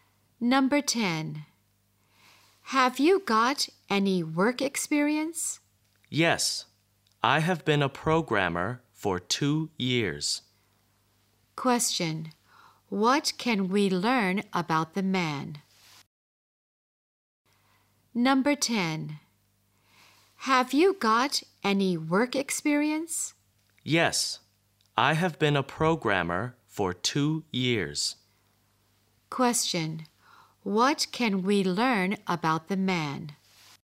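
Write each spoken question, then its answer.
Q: What can we learn about the man?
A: He has been a programmer for 2 years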